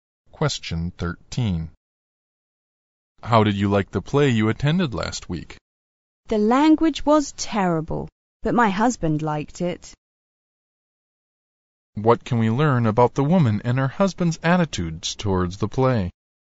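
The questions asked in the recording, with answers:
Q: What can we learn about the woman and her husband's attitudes towards the play?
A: She didn't like it (the language was terrible), but her husband liked it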